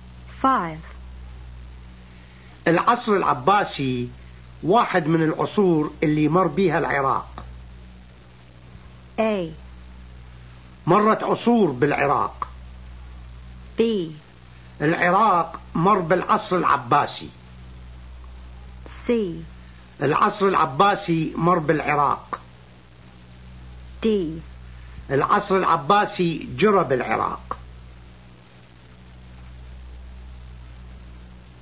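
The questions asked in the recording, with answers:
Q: العصر العباسي واحد من العصور اللي مر بيها العراق.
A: B: العراق مر بالعصر العباسي.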